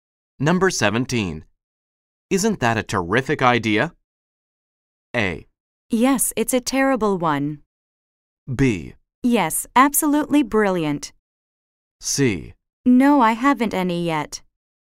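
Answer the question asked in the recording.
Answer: B: Yes, absolutely brilliant.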